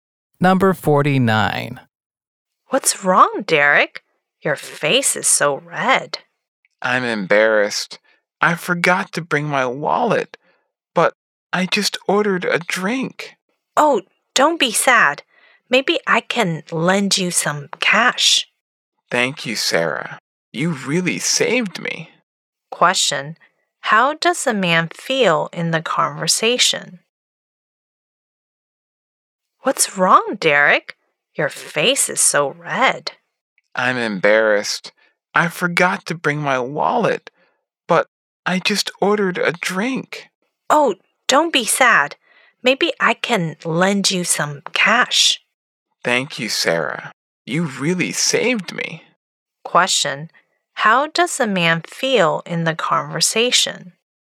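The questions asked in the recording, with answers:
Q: How does the man feel in the conversation?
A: Embarrassed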